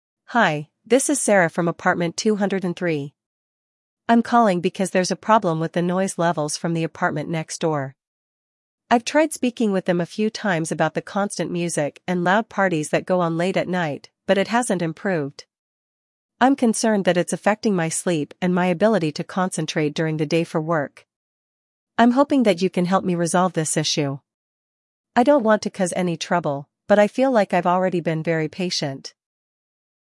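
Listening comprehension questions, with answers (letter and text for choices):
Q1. Why is Sarah calling the building management?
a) To report a broken appliance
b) To discuss a noisy neighbor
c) To request a repair in her apartment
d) To file a complaint about an unclean hallway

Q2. What is the problem Sarah is facing?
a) The heating system isn't working properly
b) Her neighbors are playing loud music and hosting parties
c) There is a leak in the ceiling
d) She has not received her mail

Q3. What does Sarah want from the management?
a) A refund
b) Assistance in resolving the noise issue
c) A new apartment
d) Permission to play music loudly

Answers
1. b) To discuss a noisy neighbor
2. b) Her neighbors are playing loud music and hosting parties
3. b) Assistance in resolving the noise issue

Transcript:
Hi, this is Sarah from apartment 203. I'm calling because there's a problem with the noise levels from the apartment next door. 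I've tried speaking with them a few times about the constant music and loud parties that go on late at night, but it hasn't improved. I'm concerned that it's affecting my sleep and my ability to concentrate during the day for work. I'm hoping that you can help me resolve this issue. I don't want to cause any trouble, but I feel like I've already been very patient.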